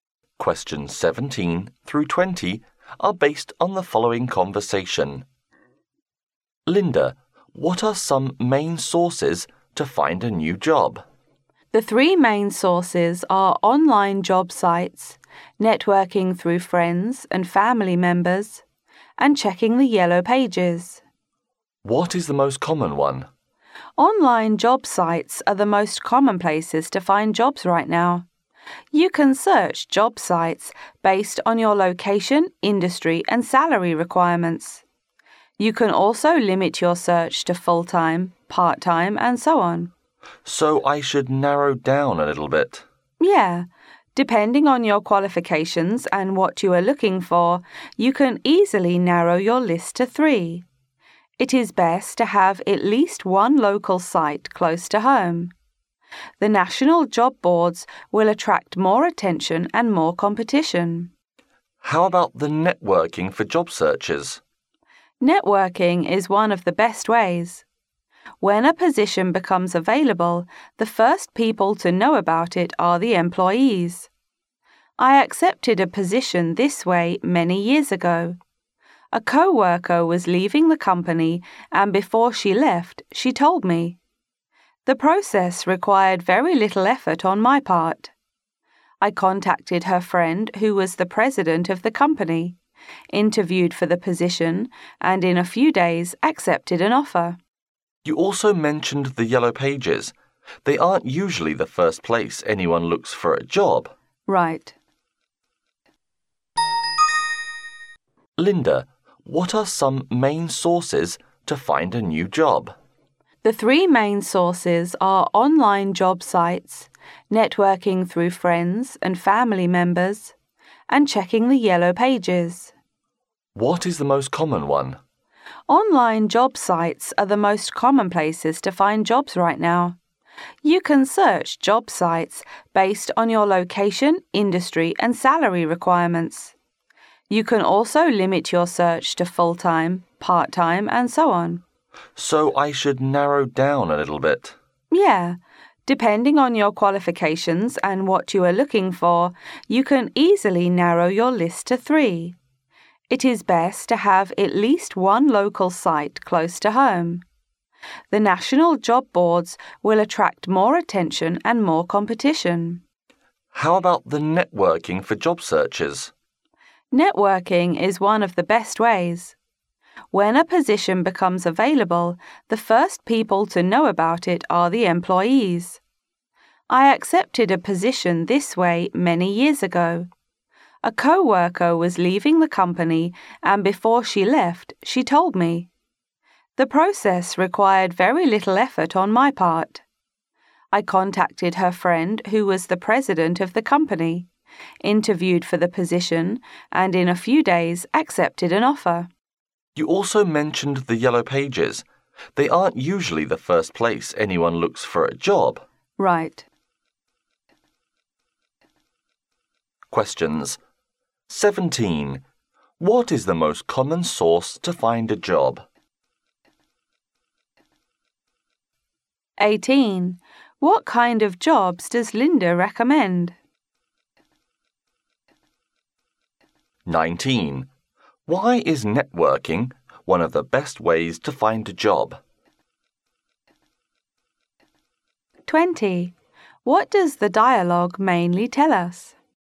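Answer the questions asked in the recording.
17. Online job sites
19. Because employees are the first to know when a position becomes available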